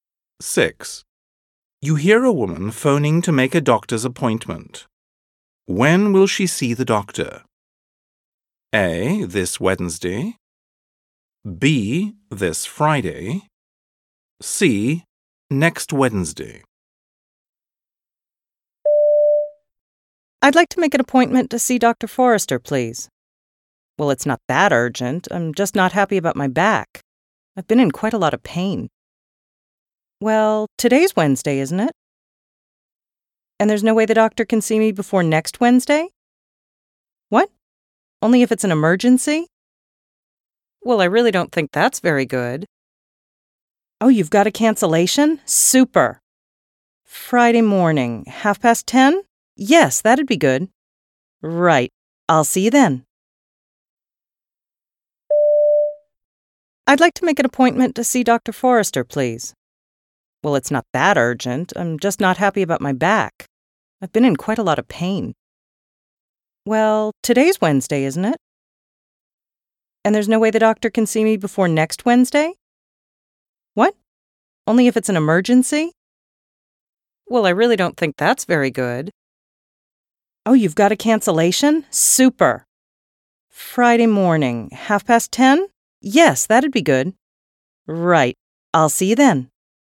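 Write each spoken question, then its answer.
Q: When will she see the doctor? A. This Wednesday. B. This Friday. C. Next Wednesday.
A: B: This Friday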